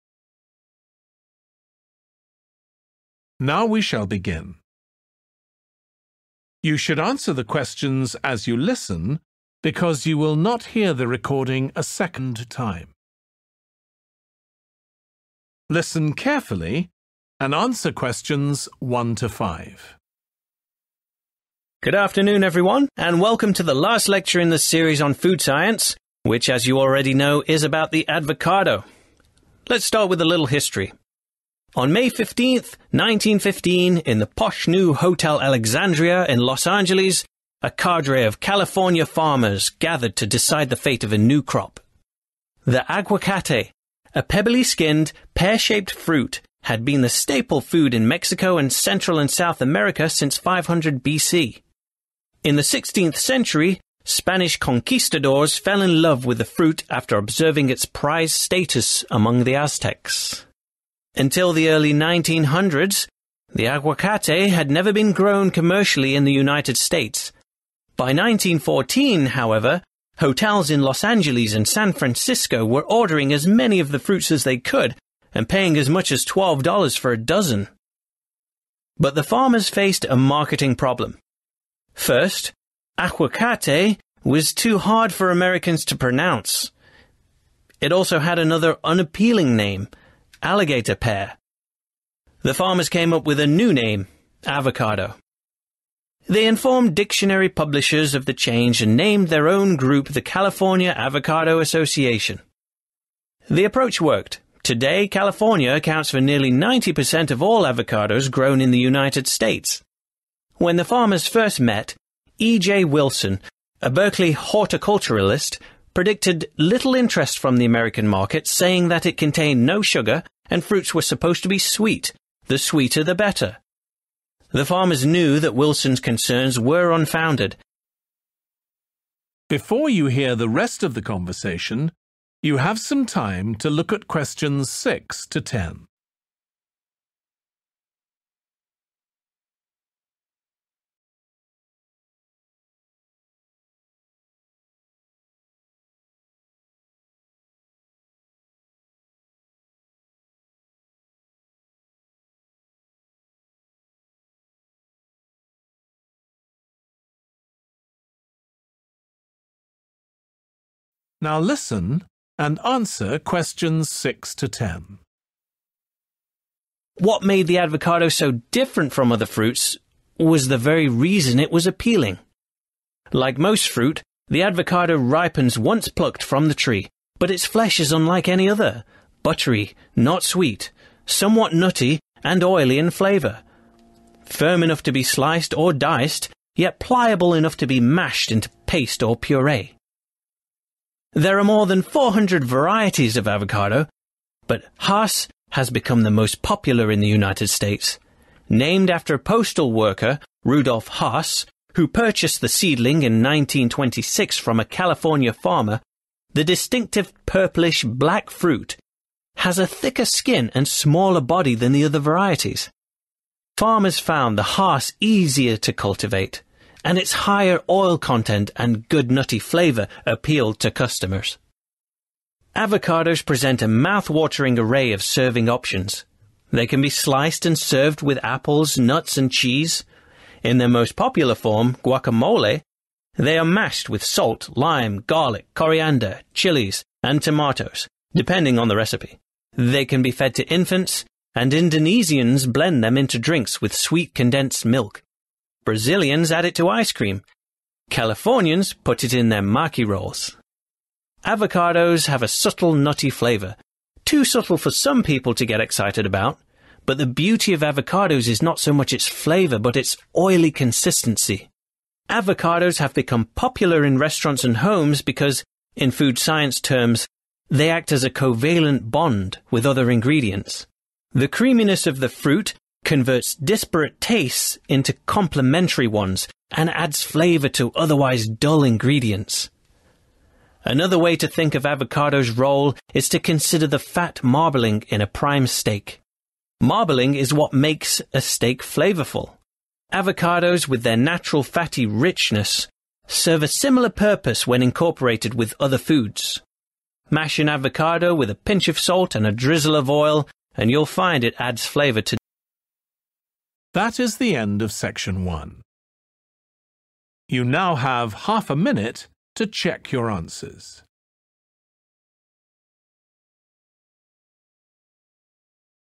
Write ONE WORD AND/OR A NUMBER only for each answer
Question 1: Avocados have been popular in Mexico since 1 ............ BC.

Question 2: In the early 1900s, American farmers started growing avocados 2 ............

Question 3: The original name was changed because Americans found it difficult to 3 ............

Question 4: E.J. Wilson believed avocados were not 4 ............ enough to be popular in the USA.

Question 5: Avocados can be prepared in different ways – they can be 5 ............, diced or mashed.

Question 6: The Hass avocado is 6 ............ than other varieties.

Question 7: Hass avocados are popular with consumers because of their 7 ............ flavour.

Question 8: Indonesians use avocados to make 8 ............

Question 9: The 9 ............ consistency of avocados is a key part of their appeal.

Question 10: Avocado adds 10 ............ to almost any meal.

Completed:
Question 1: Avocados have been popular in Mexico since 500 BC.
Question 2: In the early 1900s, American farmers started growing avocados commercially
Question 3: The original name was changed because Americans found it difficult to pronounce
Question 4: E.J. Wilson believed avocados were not Sweet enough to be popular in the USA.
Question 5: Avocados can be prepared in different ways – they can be sliced, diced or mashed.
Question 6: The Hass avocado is smaller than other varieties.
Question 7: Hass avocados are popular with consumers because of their nutty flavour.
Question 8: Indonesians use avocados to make drinks
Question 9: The oily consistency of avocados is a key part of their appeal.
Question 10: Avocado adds flavour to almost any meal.